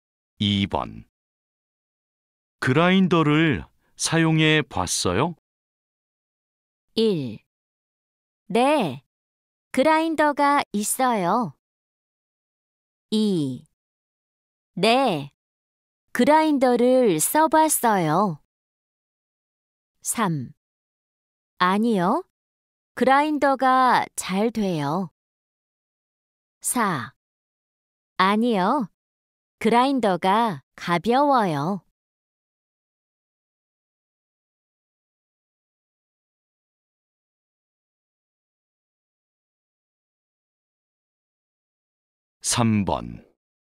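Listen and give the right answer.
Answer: 2: 네, 그라인더를 써봤어요.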